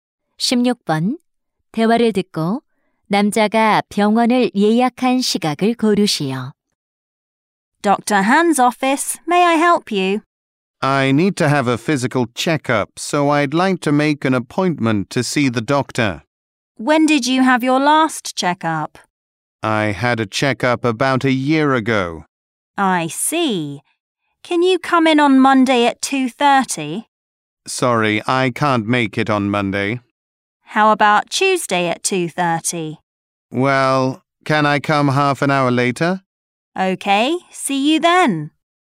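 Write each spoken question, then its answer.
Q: 대화를 듣고 남자가 병원을 예약한 시각을 고르시오.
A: 화요일 3시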